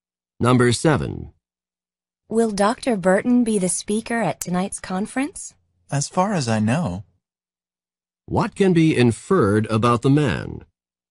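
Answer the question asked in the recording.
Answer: He thinks Dr. Burton will speak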